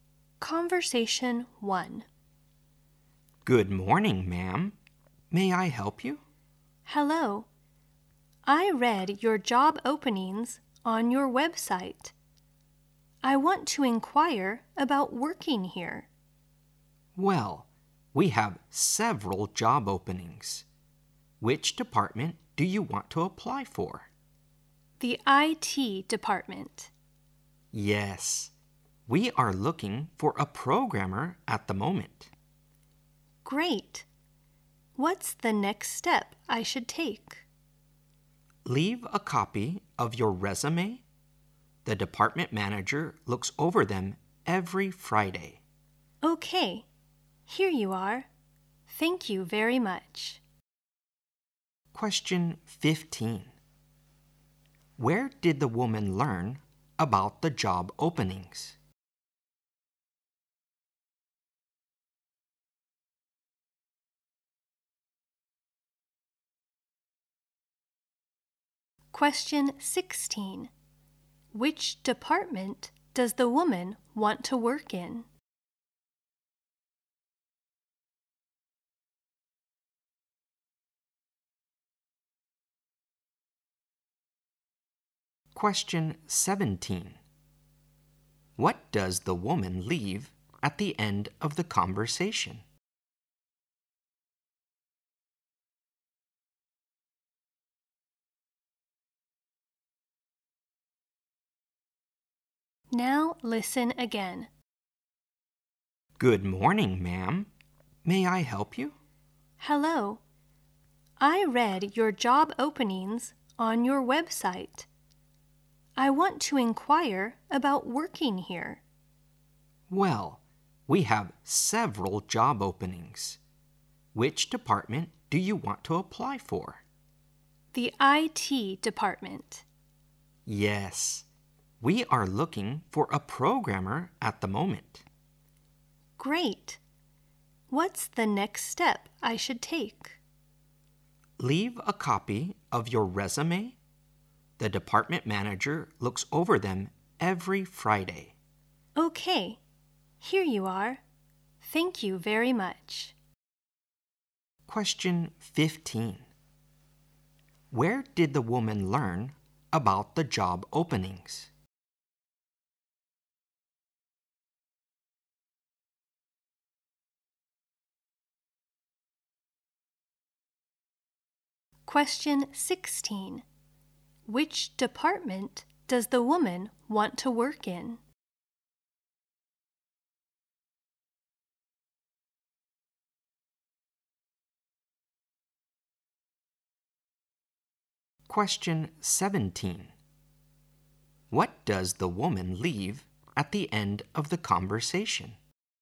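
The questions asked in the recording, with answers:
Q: Where did the woman learn about the job openings?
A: On the company's website.

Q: Which department does the woman want to work in?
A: The IT department.

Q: What does the woman leave at the end of the conversation?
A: A copy of her resume.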